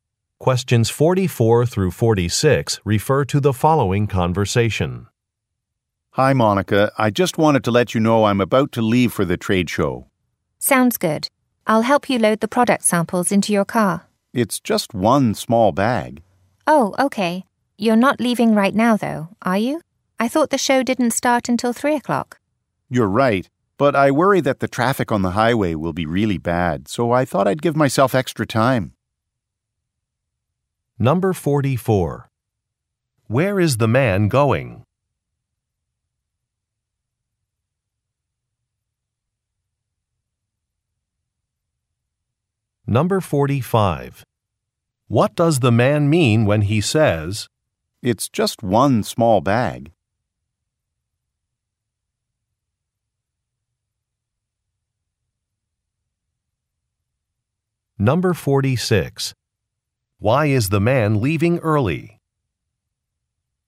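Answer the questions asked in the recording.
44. To a trade show
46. He worries about heavy traffic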